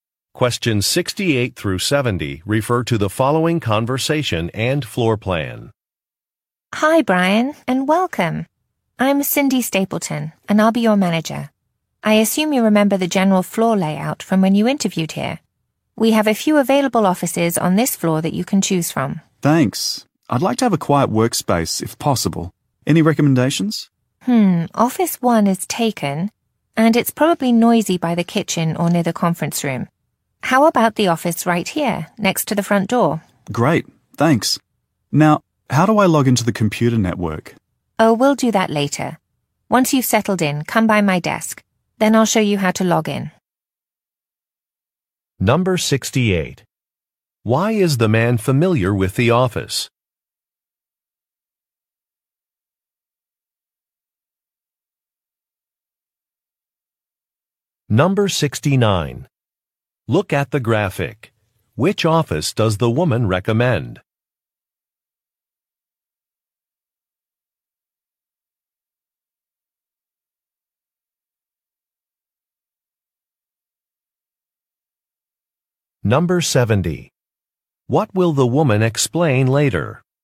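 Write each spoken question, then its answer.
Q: Why is the man familiar with the office?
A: He interviewed there before.

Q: What will the woman explain later?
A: How to log into the computer network.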